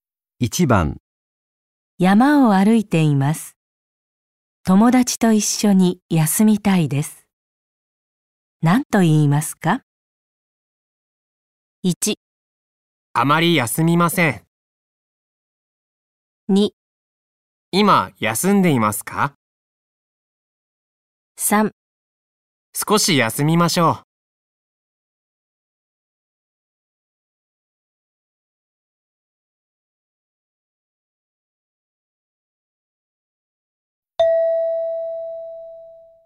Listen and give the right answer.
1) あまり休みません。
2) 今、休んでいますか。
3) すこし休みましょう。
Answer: 3) すこし休みましょう。

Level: N5 Listening · Test 1